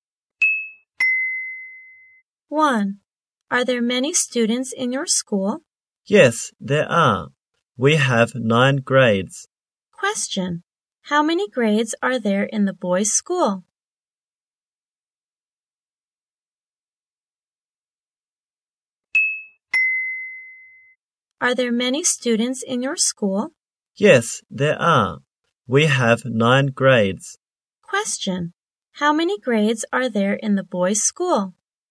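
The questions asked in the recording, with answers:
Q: Question, how many grades are there in the boys' school?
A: 9 grades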